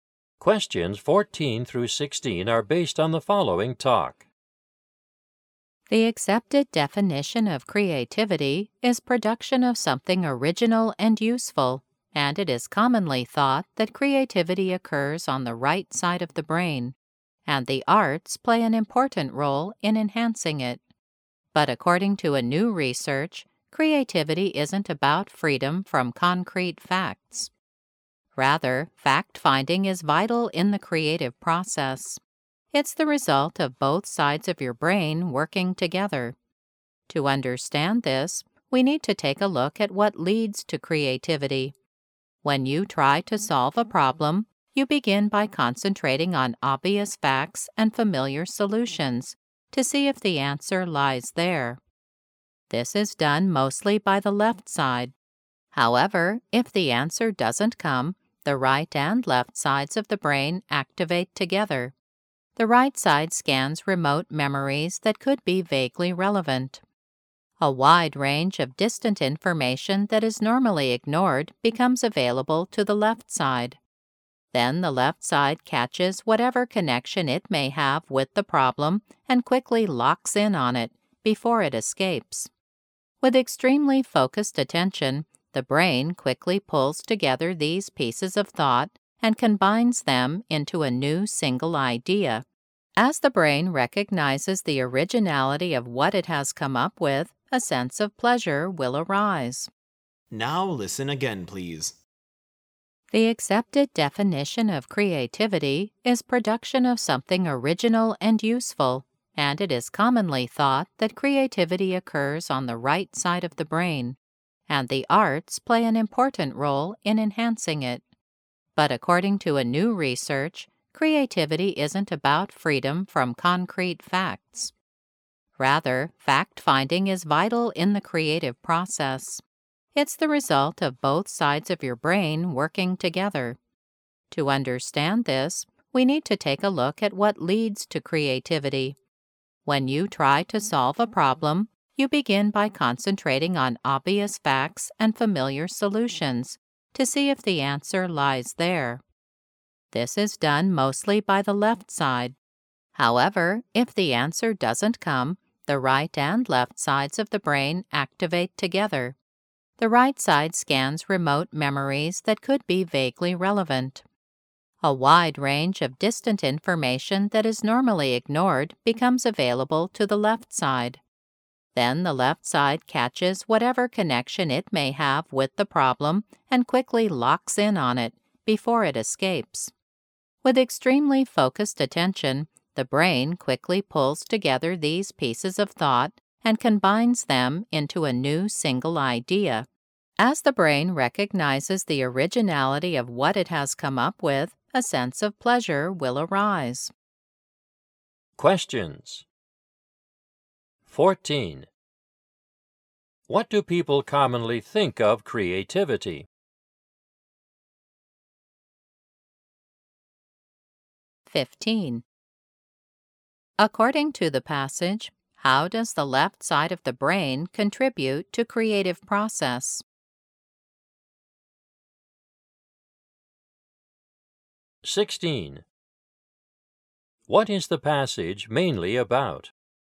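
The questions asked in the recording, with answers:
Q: What do people commonly think of creativity?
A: It occurs on the right side of the brain and is enhanced by the arts

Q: According to the passage, how does the left side of the brain contribute to creative process?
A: It focuses on obvious facts and catches connections to the problem

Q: What is the passage mainly about?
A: How creativity comes from both sides of the brain working together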